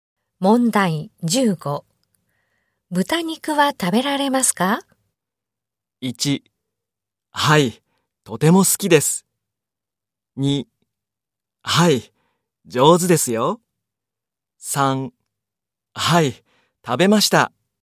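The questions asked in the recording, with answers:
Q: 豚肉は食べられますか?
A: 1: はい、とても好きです。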